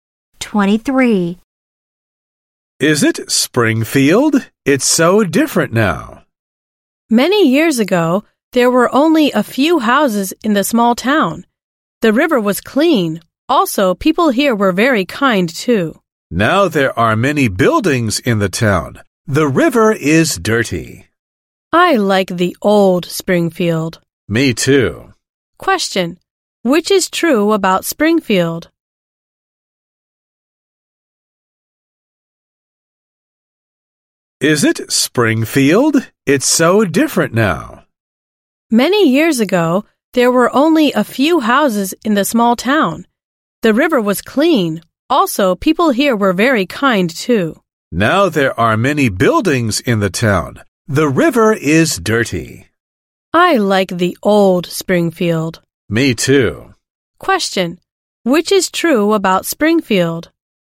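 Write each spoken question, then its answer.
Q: Which is true about Springfield?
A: It has many buildings now and its river is dirty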